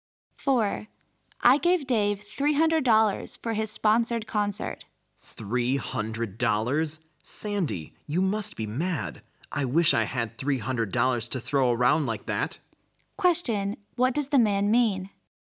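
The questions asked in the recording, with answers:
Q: what does the man mean?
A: The woman shouldn't have spent so much money; he couldn't afford it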